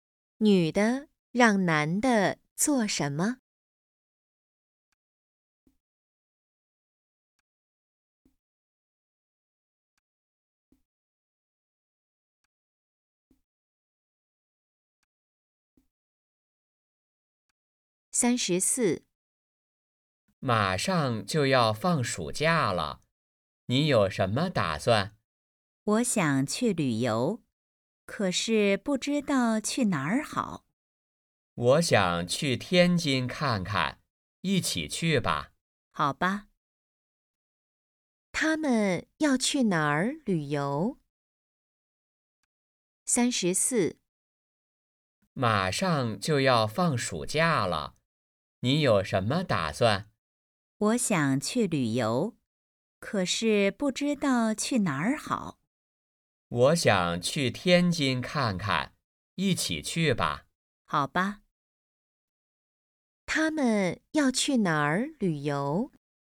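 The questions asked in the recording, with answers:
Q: 他们要去哪儿旅游?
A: 天津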